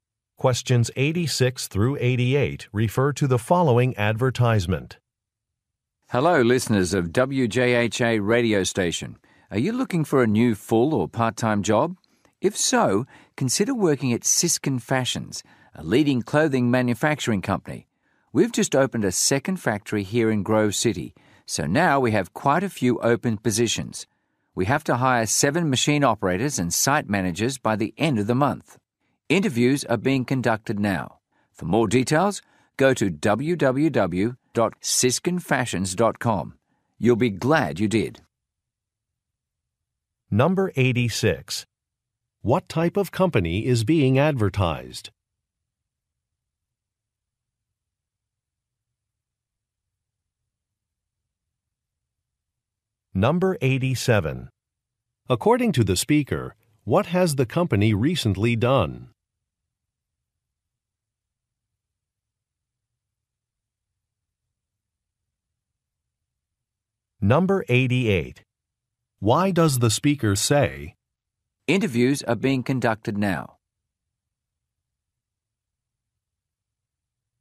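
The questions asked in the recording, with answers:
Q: What type of company is being advertised?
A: A clothing manufacturer

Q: According to the speaker, what has the company recently done?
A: Opened a second factory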